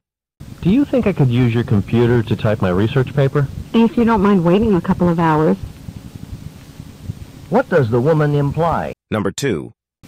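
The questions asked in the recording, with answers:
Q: What does the woman imply?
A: He can use her computer, but only after waiting a couple of hours.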